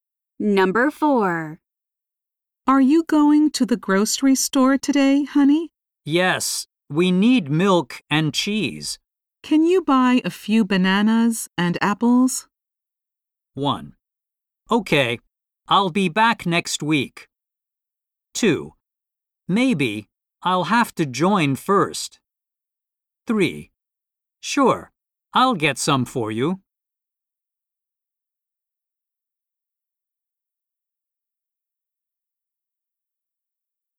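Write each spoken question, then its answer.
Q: Can you buy a few bananas and apples?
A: 3: Sure, I'll get some for you.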